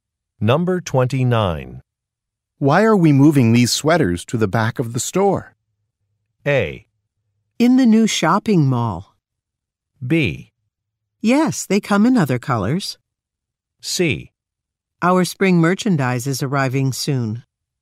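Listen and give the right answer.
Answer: C: Our spring merchandise is arriving soon.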